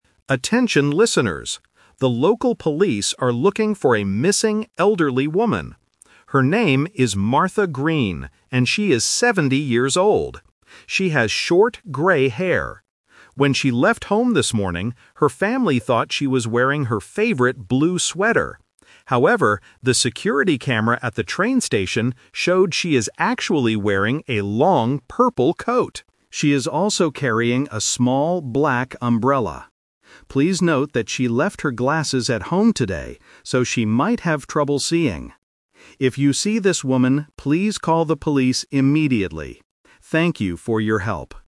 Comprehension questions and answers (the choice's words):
Listen to the radio announcement and choose the correct answer (A, B, or C).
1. What is true about Martha's appearance?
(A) She has long grey hair.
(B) She has short grey hair.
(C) She is wearing glasses.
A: She has short grey hair.

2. What is Martha wearing today?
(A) A blue sweater.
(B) A black coat.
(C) A purple coat.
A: A purple coat.

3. What is Martha carrying with her?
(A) A small black umbrella.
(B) A purple bag.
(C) Her reading glasses.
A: A small black umbrella.

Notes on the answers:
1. The announcer clearly states, "She has short grey hair." The Trap: Option (C) is a trap because the word "glasses" is mentioned in the audio, but the announcer explicitly says she "left her glasses at home today." Option (A) is wrong because her hair is short, not long.
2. Option (A) is the trap. The family thought she was wearing a blue sweater, but that information was incorrect. Option (B) mixes the color "black" (from the umbrella) to confuse the listener.
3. The audio explicitly says, "She is also carrying a small black umbrella." The Trap: Option (C) is a trap again because she forgot her glasses at home. Option (B) is a plausible distraction that uses the color "purple" from her coat.

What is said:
The local police are looking for a missing elderly woman. Her name is Martha Green, and she is seventy years old. When she left home this morning, her family thought she was wearing her favorite blue sweater. However, the security camera at the train station showed she is actually wearing a long purple coat. She is also carrying a small black umbrella. Please note that she left her glasses at home today, so she might have trouble seeing. If you see this woman, please call the police immediately. Thank you for your help.

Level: A2